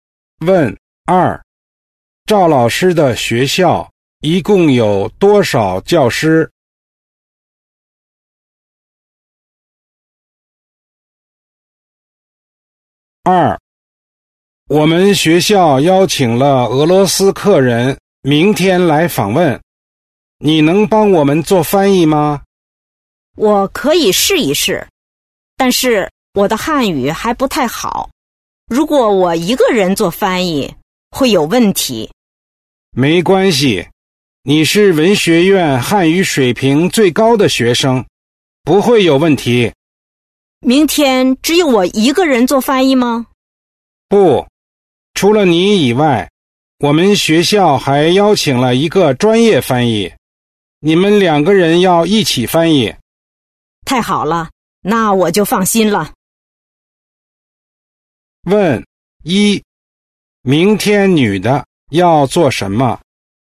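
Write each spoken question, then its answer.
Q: 明天女的要做什么?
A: 做翻译

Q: 她要和谁一起工作?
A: 一个专业翻译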